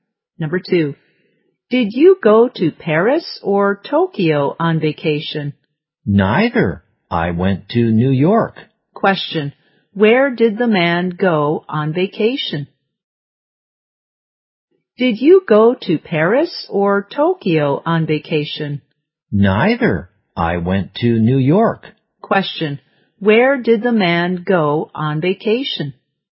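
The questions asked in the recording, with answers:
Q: Where did the man go on vacation?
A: New York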